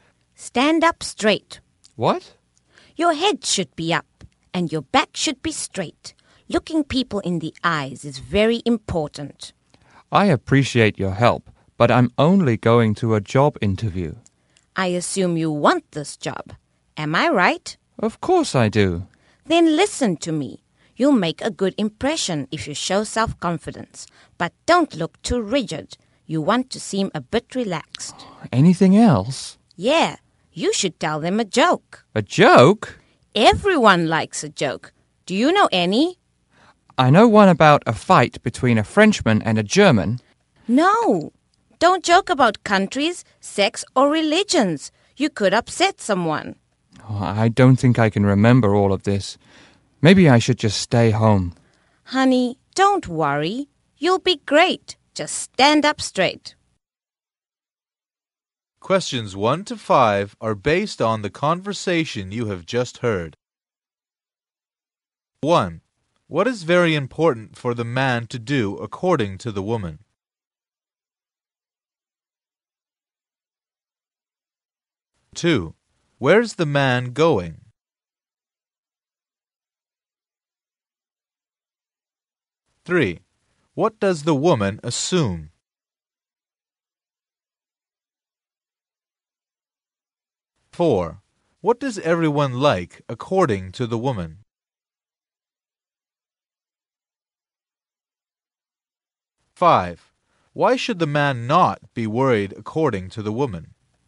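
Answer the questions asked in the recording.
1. Look people in the eyes
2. To a job interview
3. That the man wants the job
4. A joke
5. Because he'll be great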